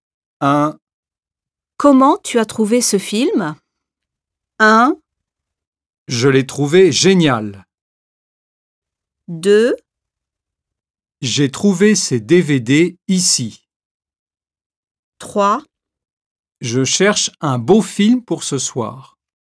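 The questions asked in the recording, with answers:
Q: Comment tu as trouvé ce film?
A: 1: Je l'ai trouvé génial.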